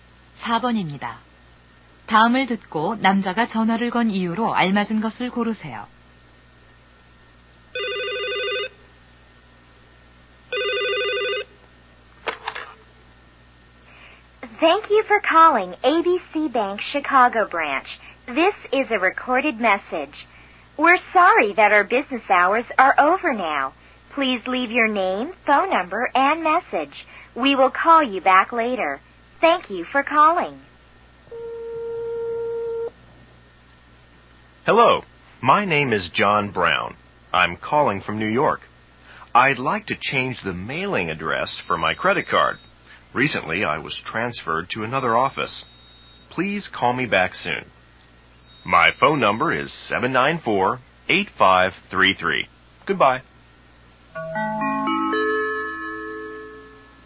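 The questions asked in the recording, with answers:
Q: 다음을 듣고 남자가 전화를 건 이유로 알맞은 것을 고르세요.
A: 신용카드 우편 주소를 변경하려고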